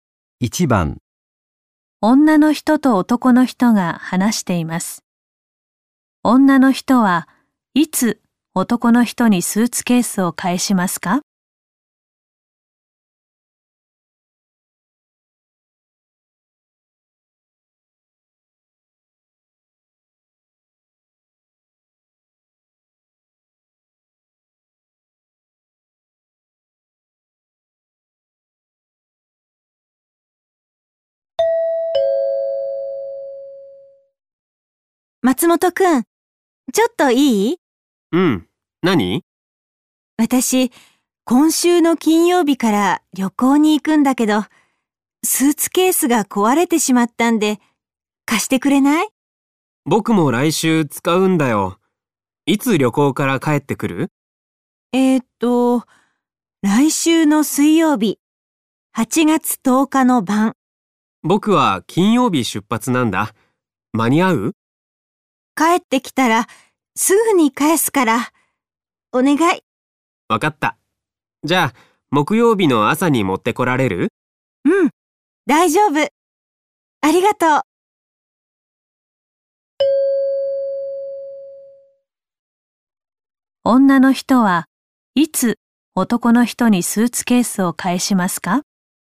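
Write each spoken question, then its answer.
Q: 女の人はいつ男の人にスーツケースを返しますか?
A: 木曜日(8月11日)の朝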